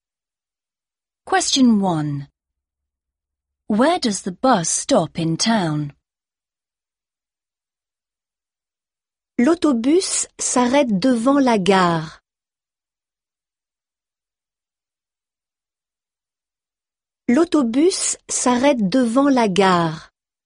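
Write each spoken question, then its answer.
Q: Where does the bus stop in town?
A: In front of the station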